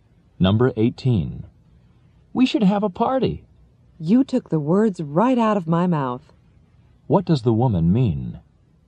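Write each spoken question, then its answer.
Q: What does the woman mean?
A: She agrees that they should have a party.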